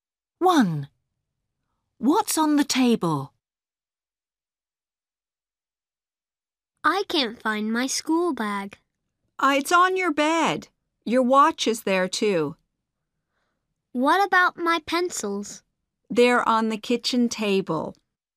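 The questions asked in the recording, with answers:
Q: What's on the table?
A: pencils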